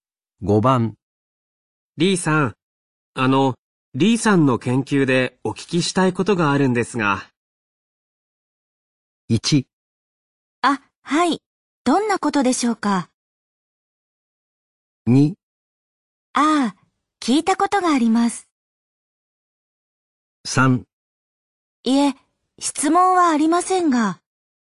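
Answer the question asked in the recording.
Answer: 1: あ、はい、どんなことでしょうか。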